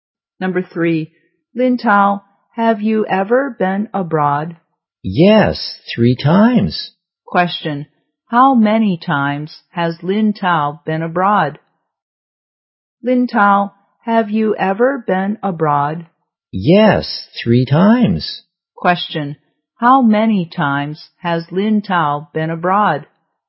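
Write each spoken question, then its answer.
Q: how many times has Lin Tao been abroad?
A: 3 times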